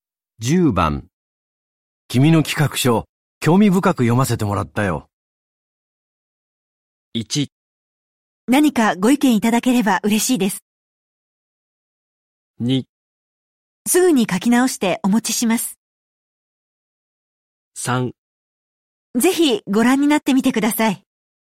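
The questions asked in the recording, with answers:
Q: 君の企画書、興味深く読ませてもらったよ。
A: 1: 何かご意見いただければ嬉しいです。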